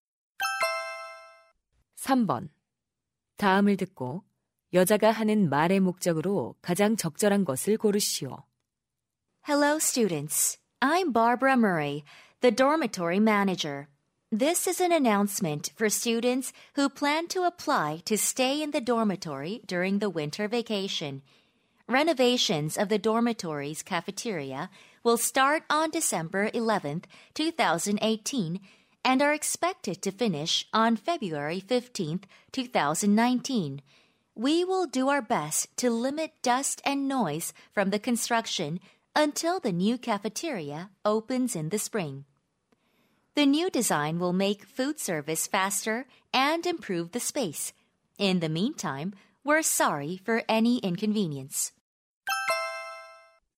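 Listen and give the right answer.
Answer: 기숙사 식당 보수 공사를 알리려고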